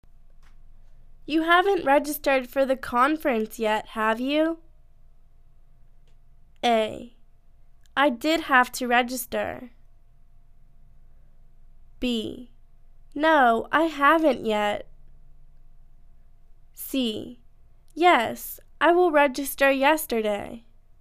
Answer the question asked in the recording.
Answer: No, I haven't yet.